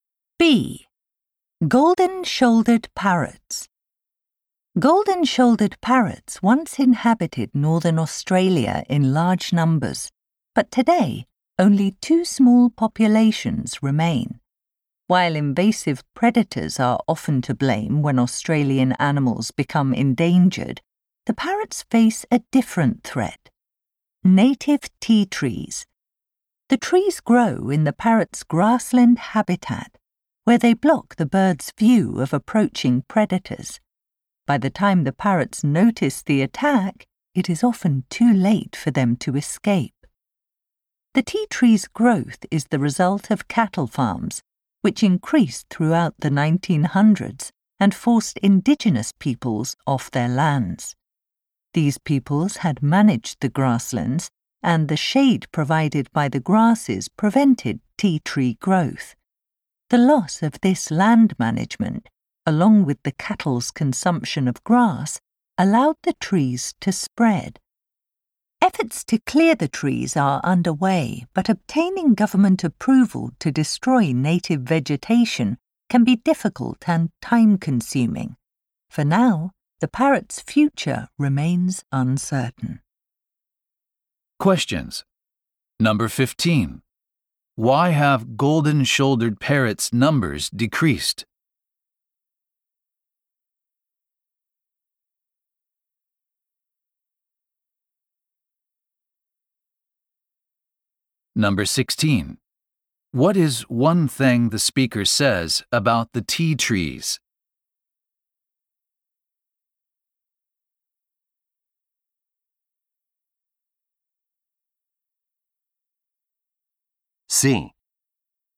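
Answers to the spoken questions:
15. Tea trees block their view of approaching predators.
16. They spread because cattle farms ended indigenous land management and cattle ate the grass.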